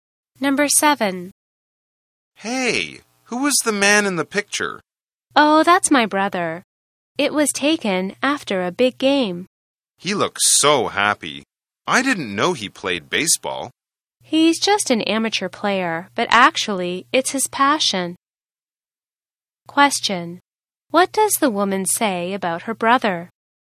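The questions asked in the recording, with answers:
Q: What does the woman say about her brother?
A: He is an amateur baseball player, but baseball is his passion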